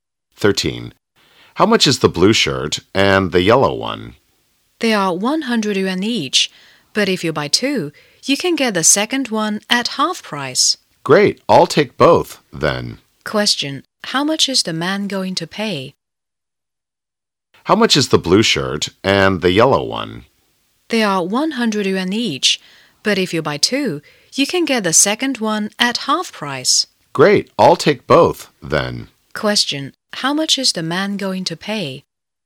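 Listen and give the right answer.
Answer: 150 yuan.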